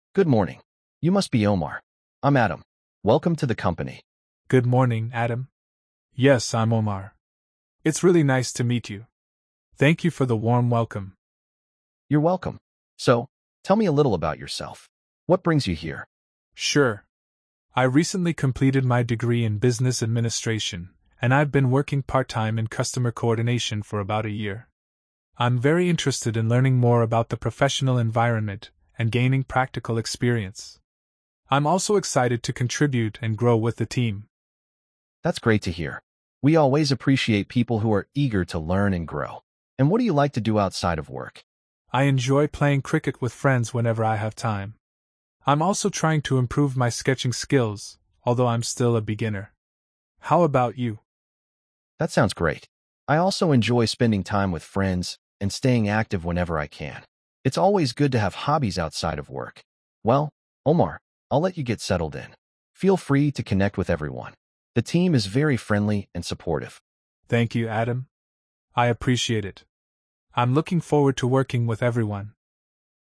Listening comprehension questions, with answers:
Complete the phrases as you listen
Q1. Good morning! You must be Omar. I'm Adam. ______ to the company!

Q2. It's really nice to meet you. Thank you for the ______ welcome.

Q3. So, tell me a little about yourself. What ______ you here?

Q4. I'm also excited to ______ and grow with the team.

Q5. We always appreciate people who are ______ to learn and grow.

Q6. What do you like to do ______ of work?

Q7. I'm looking forward ______ working with everyone.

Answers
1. Welcome
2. warm
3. brings
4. contribute
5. eager
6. outside
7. to

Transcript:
Adam:
"Good morning! You must be Omar. I'm Adam. Welcome to the company!"
Omar:
"Good morning, Adam. Yes, I'm Omar. It's really nice to meet you. Thank you for the warm welcome."
Adam:
"You're welcome. So, tell me a little about yourself. What brings you here?"
Omar:
"Sure. I recently completed my degree in business administration, and I've been working part-time in customer coordination for about a year. I'm very interested in learning more about the professional environment and gaining practical experience. I'm also excited to contribute and grow with the team."
Adam:
"That's great to hear. We always appreciate people who are eager to learn and grow. And what do you like to do outside of work?"
Omar:
"I enjoy playing cricket with friends whenever I have time. I'm also trying to improve my sketching skills, although I'm still a beginner. How about you?"
Adam:
"That sounds great. I also enjoy spending time with friends and staying active whenever I can. It's always good to have hobbies outside of work. Well, Omar, I'll let you get settled in. Feel free to connect with everyone. The team is very friendly and supportive."
Omar:
"Thank you, Adam. I appreciate it.
Perfect! I'm looking forward to working with everyone.